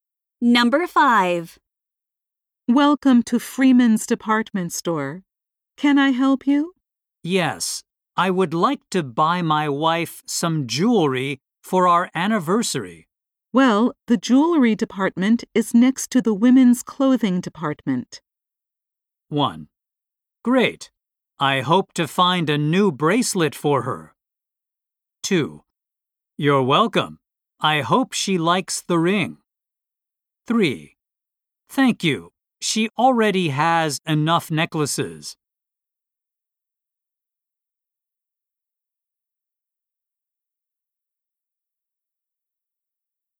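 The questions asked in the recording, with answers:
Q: Well, the jewelry department is next to the women's clothing department.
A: 1: Great. I hope to find a new bracelet for her.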